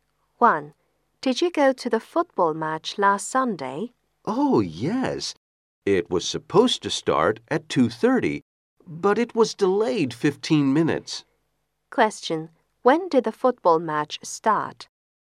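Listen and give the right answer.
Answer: At 2:45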